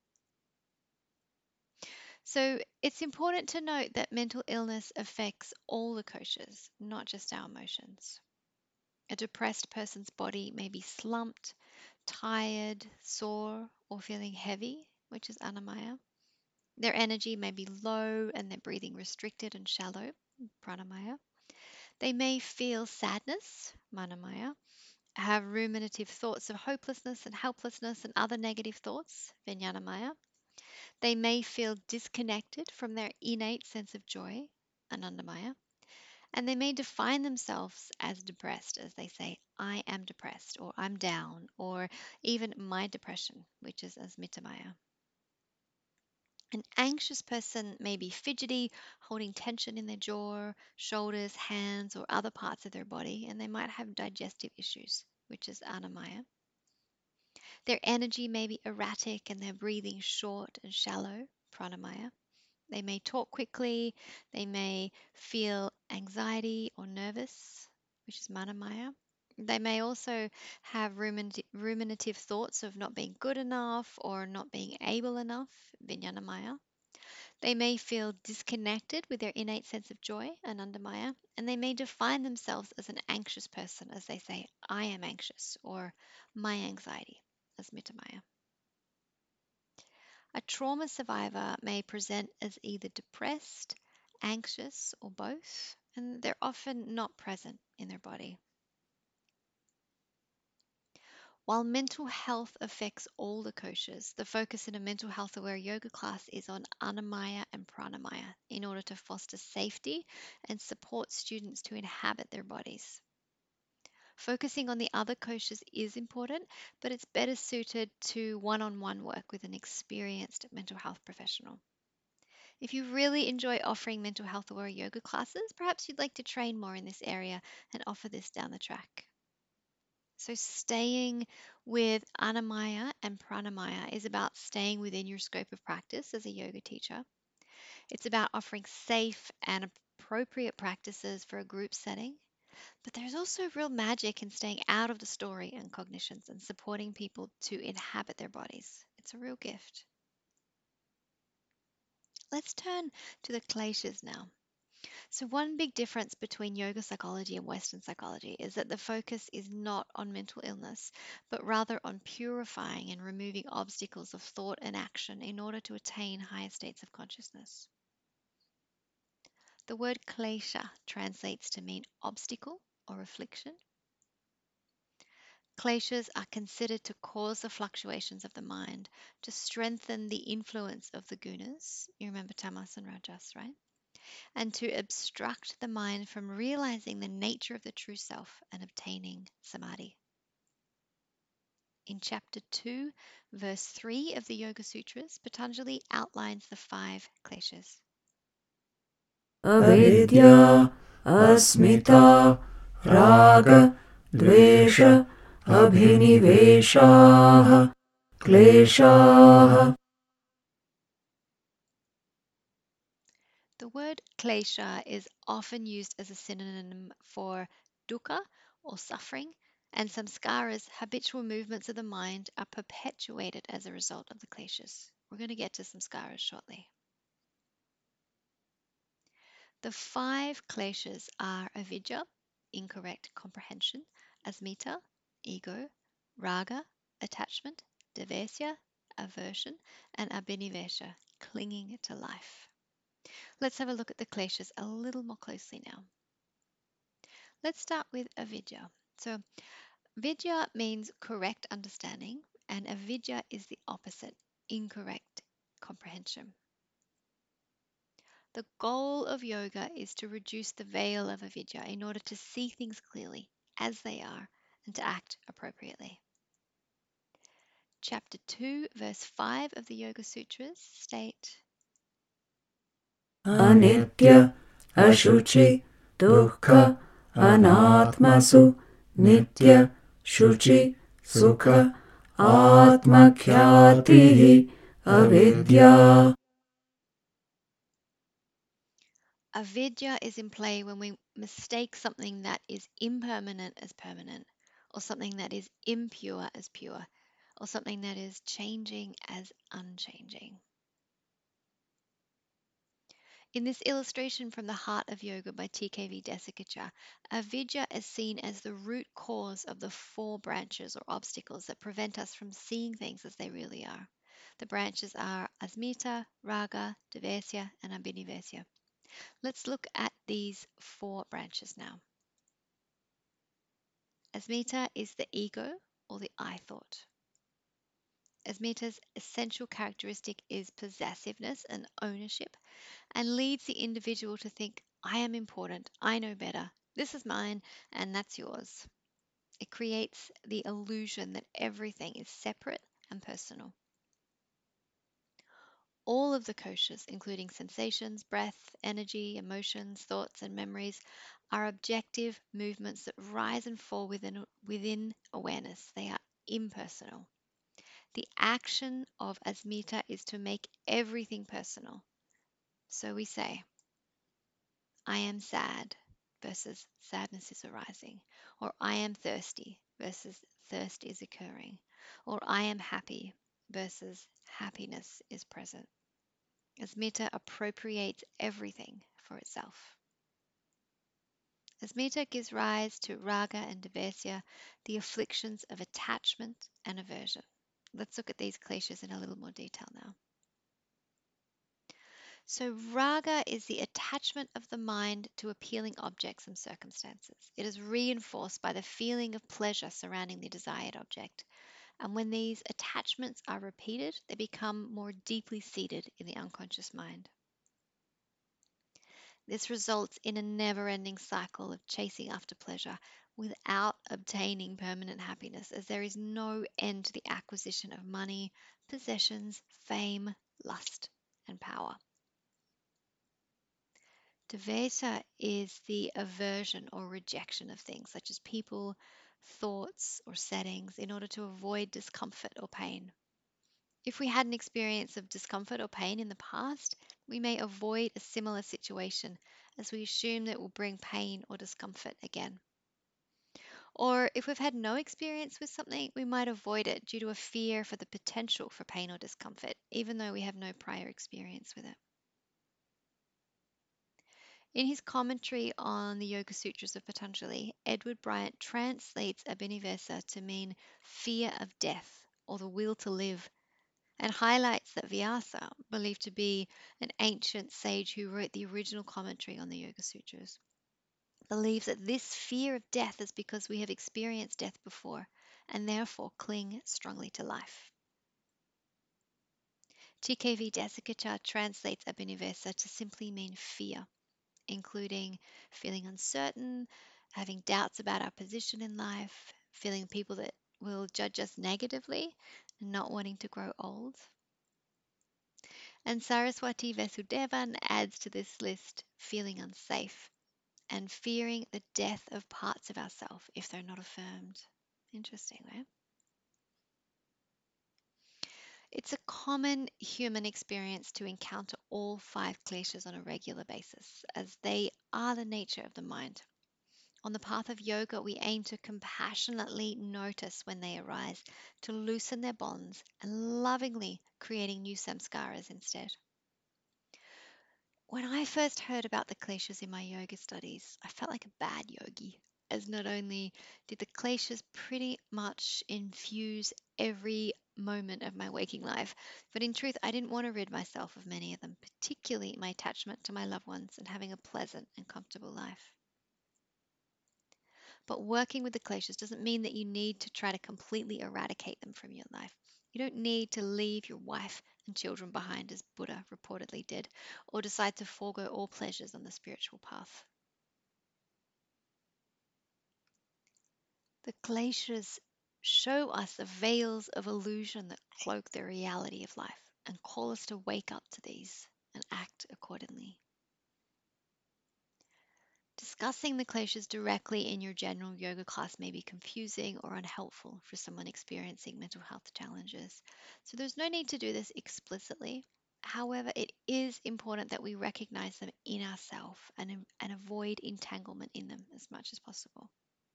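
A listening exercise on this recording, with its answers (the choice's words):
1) Mental illness affects which koshas?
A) Manomaya kosha only.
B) Vijnānamaya kosha only.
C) Annamaya and prāṇāyama koshas only.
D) All the koshas.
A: All the koshas.

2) The kleśhas (avidyā, asmitā, rāga, dveṣa, abhiniveśāḥ) are considered to:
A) Cause the fluctuations of the mind.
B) Strengthen the influence of the gunas.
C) Obstruct the mind from realising the nature of the true self and realising samādhi.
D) All of the above.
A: All of the above.

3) If the kleshas show up in your life, it means:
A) You're a bad yogi.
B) You should immediately attempt to completely eradicate them from your life.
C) You're being shown the veils of illusion that cloak the reality of life and you're being called to wake up to these and act accordingly.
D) You should give up practicing yoga.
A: You're being shown the veils of illusion that cloak the reality of life and you're being called to wake up to these and act accordingly.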